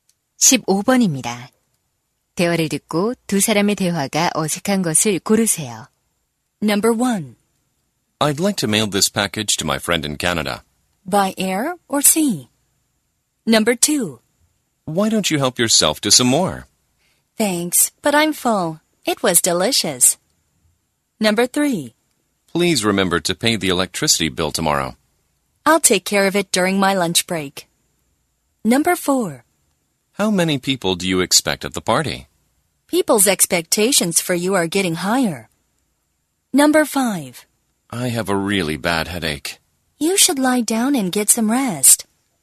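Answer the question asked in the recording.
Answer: 4번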